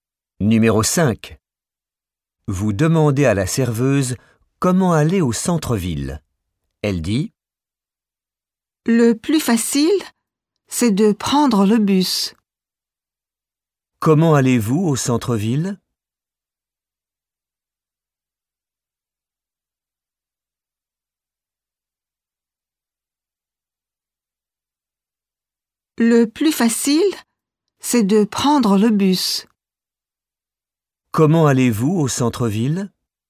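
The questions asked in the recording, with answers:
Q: Comment allez-vous au centre-ville?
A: En bus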